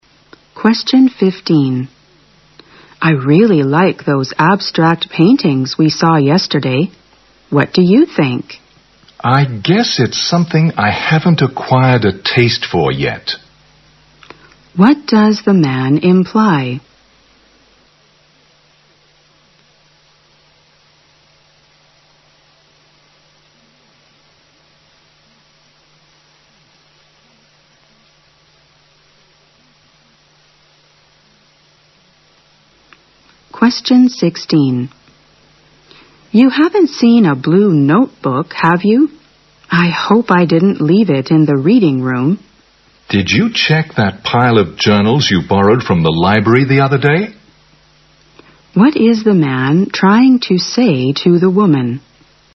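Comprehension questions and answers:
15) What does the man imply?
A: He doesn't like abstract paintings.

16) What is the man trying to say to the woman?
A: she may have put her notebook amid the journals.

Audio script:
W: I really like those abstract paintings we saw yesterday. What do you think?
M: I guess it's something I haven't acquired a taste for yet.
Q: What does the man imply?
W: You haven't seen a blue notebook, have you? I hope I didn't leave it in the reading room.
M: Did you check that pile of journals you've borrowed from the library the other day?
Q: What is the man trying to say to the woman?

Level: 大学英语四级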